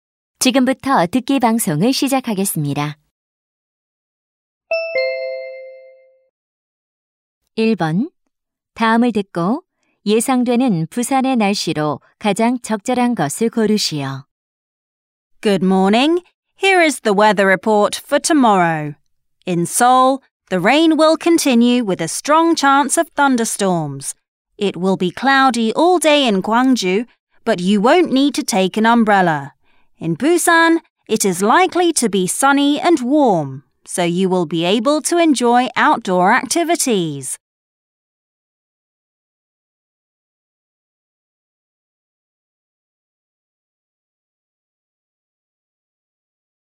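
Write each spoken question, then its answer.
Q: 다음을 듣고 예상되는 부산의 날씨로 가장 적절한 것을 고르시오.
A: 맑고 따뜻함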